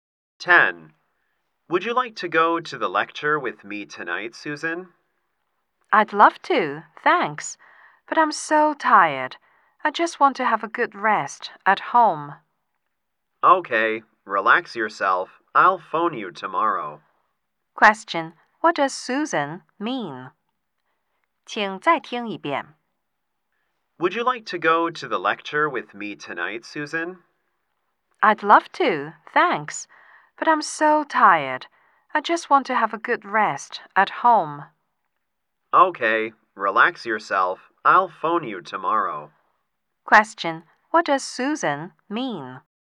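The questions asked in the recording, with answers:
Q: What does Susan mean?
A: She won't go to the lecture; she wants to rest at home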